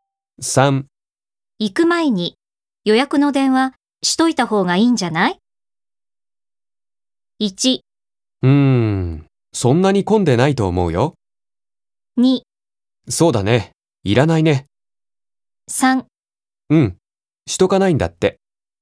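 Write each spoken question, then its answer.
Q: 行く前に予約の電話しといた方がいいんじゃない ?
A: 1: そんなに混んでないと思うよ。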